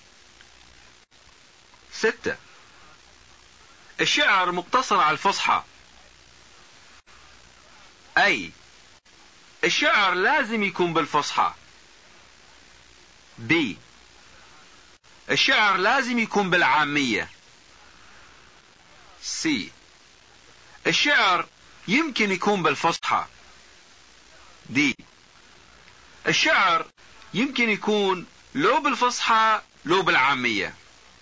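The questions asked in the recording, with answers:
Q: ستة. الشعر مقتصر على الفصحى.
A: A: الشعر لازم يكون بالفصحى.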